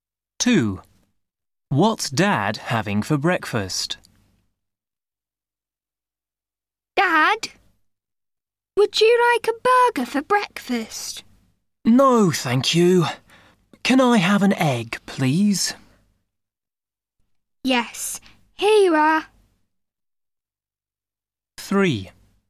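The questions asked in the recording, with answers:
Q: What's Dad having for breakfast?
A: an egg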